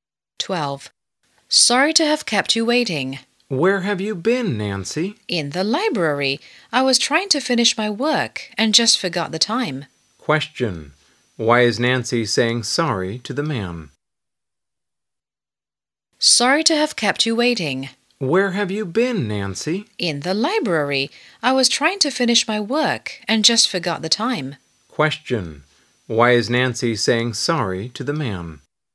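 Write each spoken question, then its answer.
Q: Question. Why is Nancy saying sorry to the man?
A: She kept him waiting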